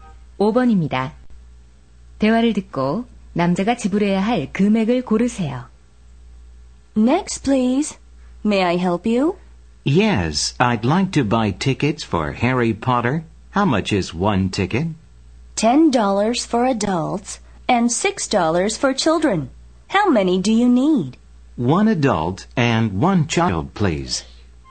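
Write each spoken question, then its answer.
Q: 대화를 듣고 남자가 지불해야 할 금액을 고르세요.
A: 16달러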